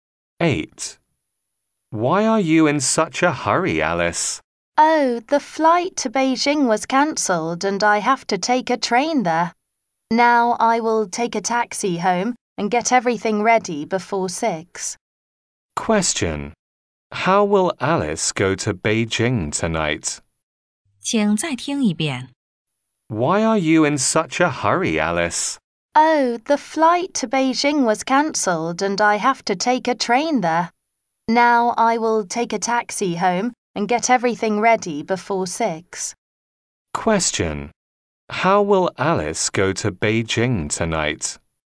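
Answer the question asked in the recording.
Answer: By train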